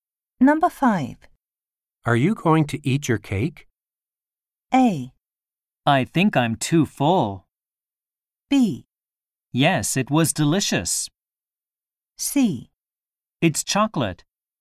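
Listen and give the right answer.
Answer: A: I think I'm too full.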